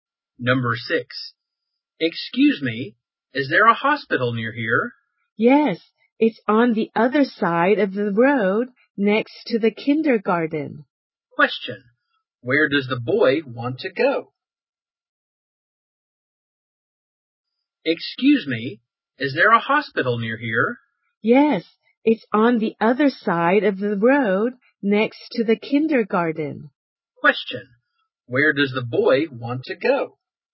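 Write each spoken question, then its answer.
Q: where does the boy want to go?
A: To a hospital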